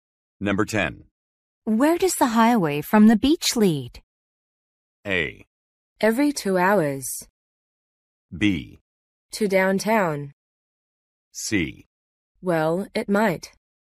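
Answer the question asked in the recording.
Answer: B: To downtown.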